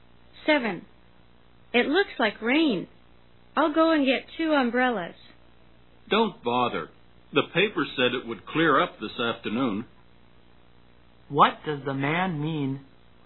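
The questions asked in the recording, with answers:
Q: What does the man mean?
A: There's no need for umbrellas; it will clear up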